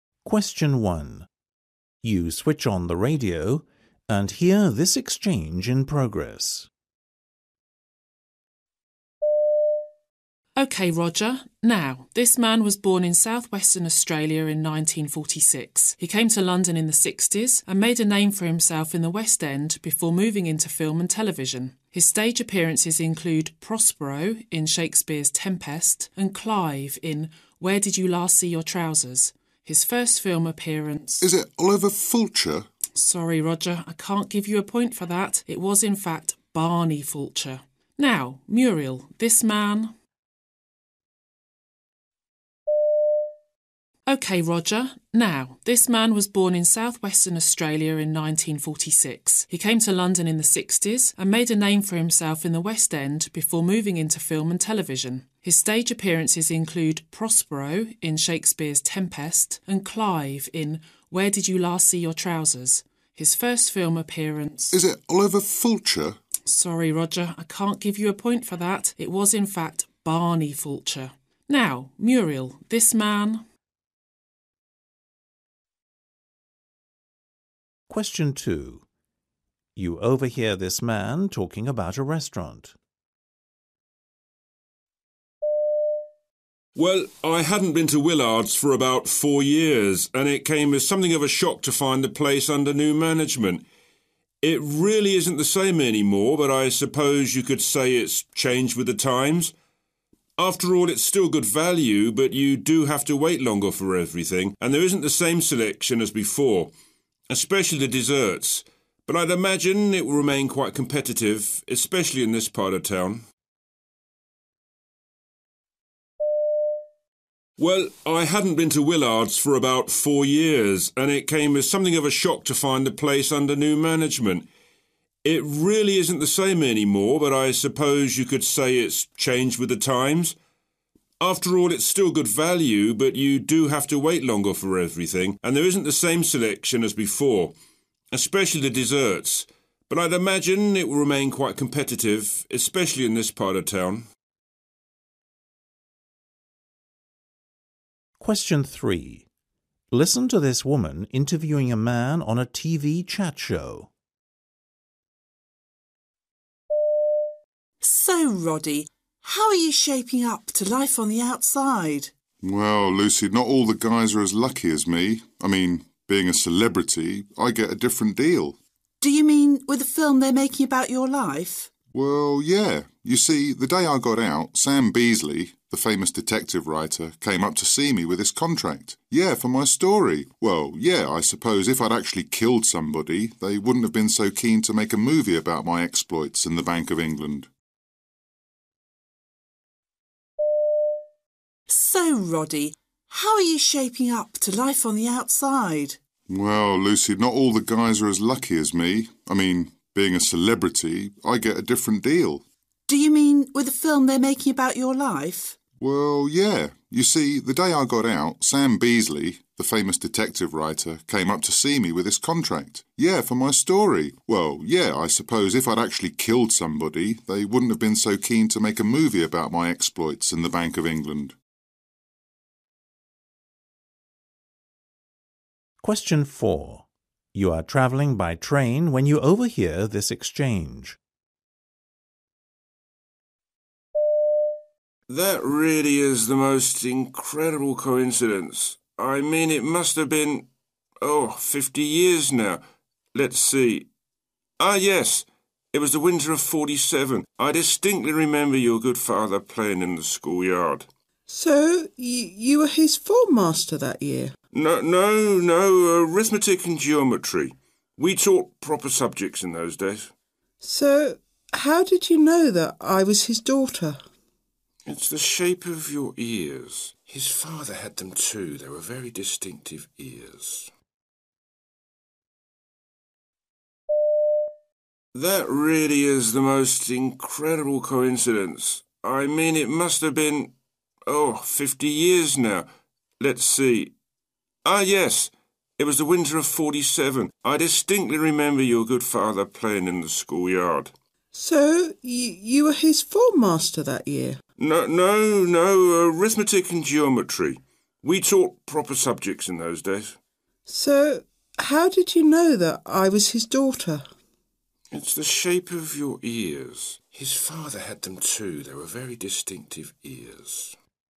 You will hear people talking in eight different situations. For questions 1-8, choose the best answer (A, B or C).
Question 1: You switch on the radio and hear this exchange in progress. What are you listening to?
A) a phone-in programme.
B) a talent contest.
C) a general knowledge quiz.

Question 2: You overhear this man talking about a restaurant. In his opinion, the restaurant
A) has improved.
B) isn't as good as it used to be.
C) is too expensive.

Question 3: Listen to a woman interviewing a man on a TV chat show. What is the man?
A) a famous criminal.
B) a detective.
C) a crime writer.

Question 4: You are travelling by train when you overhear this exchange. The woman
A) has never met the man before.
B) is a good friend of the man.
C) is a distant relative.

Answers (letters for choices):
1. C
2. B
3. A
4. A

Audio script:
1 You switch on the radio and hear this exchange in progress.
P: Okay Roger, ... Now, this man was born in South Western Australia in 1946. He came to London in the sixties and made a name for himself in the West End before moving into film and television. His stage appearances include 'Prospero' in Shakespeare's 'Tempest' and 'Clive' in 'Where did you last see your trousers?' His first film appearance ...
R: Is it Oliver Fulcher?
P: Sorry Roger, I can't give you a point for that. It was in fact Barney Fulcher. Now Muriel, this man ...
2 You overhear this man talking about a restaurant.
Well, I hadn't been to Willard's for about four years and it came as something of a shock to find the place under new management. It really isn't the same any more but I suppose you could say it's changed with the times. After all, it's still good value ... but you do have to wait longer for everything and there isn't the same selection as before – especially the desserts – but I'd imagine it will remain quite competitive, especially in this part of town.
3 Listen to a woman interviewing a man on a TV chat show.
L: So Roddy ... How are you shaping up to life on the outside?
R: Well, Lucy not all the guys are as lucky as me – I mean, being a celebrity ... I get a different deal.
L: Do you mean with the film they're making about your life?
R: Well, yeah, ... you see, the day I got out, Sam Beesly, the famous detective writer came up to see me with this contract ... yeah for my story ... Well, yeah, I suppose if I'd actually killed somebody ... they wouldn't have been so keen to make a movie about my exploits and the bank of England.
4 You are travelling by train when you overhear this exchange.
M: That really is the most incredible coincidence. I mean it must have been ... oh ... fifty years now. Let's see. Ah yes, it was the winter of '47. I distinctly remember your good father playing in the school yard.
W: So you were his form master that year?
M: No, no, no arithmetic and geometry ... we taught proper subjects in those days ...
W: So, how did you know that I was his daughter?
M: It's the shape of your ears ...